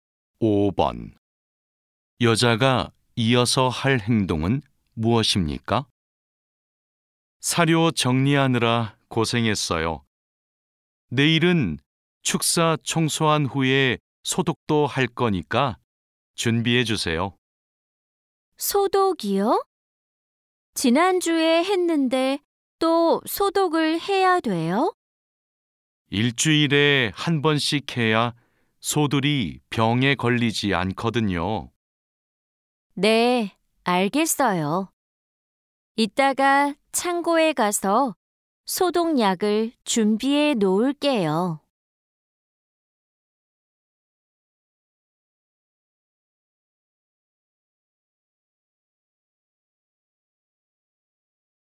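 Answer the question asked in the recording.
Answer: 창고에 가서 소독약을 준비한다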